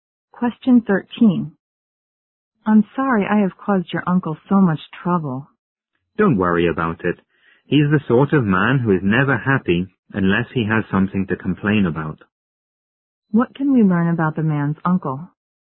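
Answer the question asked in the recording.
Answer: He is always complaining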